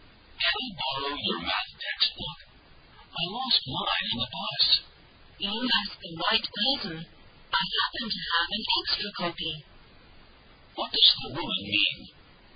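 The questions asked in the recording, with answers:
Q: What does the woman mean?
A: She can lend him her extra copy of the math textbook.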